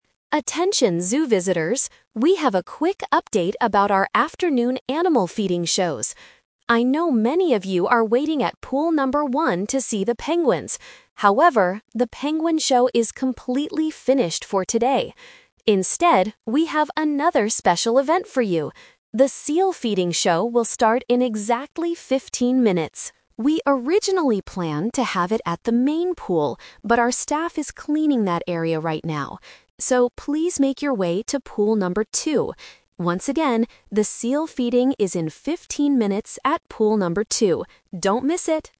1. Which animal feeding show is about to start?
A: The seal show.

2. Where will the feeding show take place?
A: At Pool number 2.

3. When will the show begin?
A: In 15 minutes.

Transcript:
Announcer: Attention, zoo visitors! We have a quick update about our afternoon animal feeding shows. I know many of you are waiting at Pool number 1 to see the penguins. However, the penguin show is completely finished for today. Instead, we have another special event for you. The seal feeding show will start in exactly 15 minutes! We originally planned to have it at the main pool, but our staff is cleaning that area right now. So, please make your way to Pool number 2. Once again, the seal feeding is in 15 minutes at Pool number 2. Don't miss it!

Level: A2